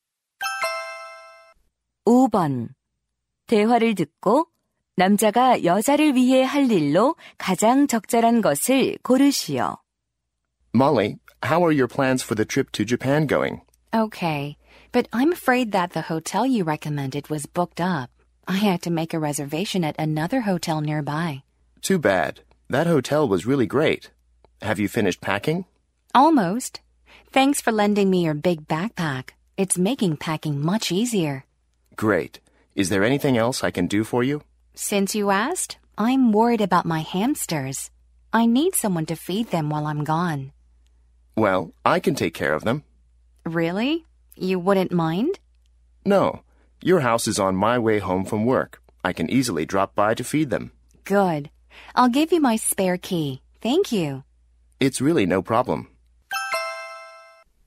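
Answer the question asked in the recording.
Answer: 햄스터 먹이 주기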